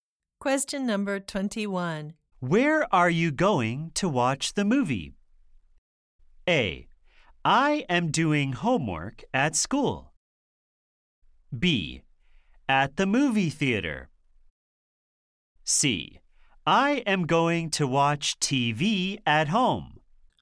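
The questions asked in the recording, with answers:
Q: Where are you going to watch the movie?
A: B: At the movie theater.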